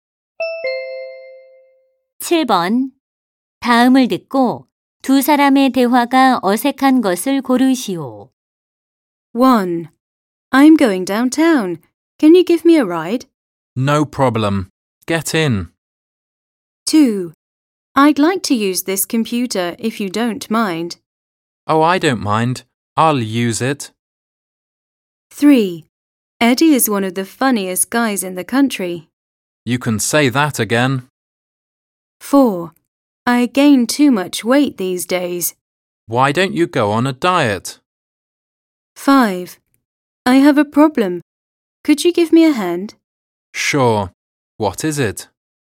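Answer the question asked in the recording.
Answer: 2: I'd like to use this computer if you don't mind. / Oh, I don't mind. I'll use it.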